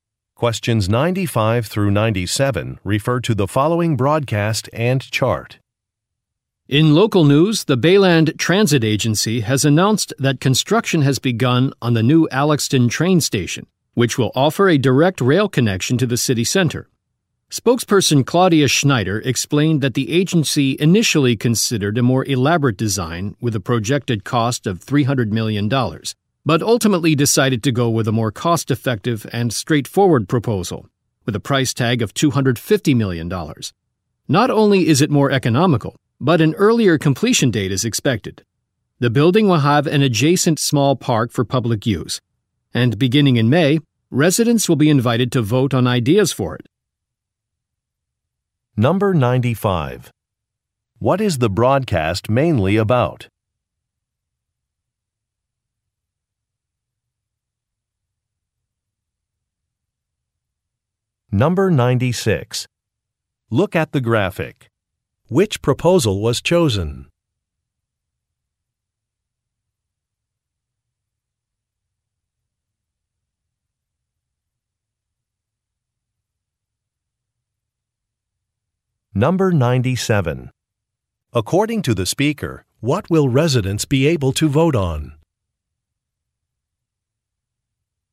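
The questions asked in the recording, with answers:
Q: What is the broadcast mainly about?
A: Construction of a new train station

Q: According to the speaker, what will residents be able to vote on?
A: Ideas for the small park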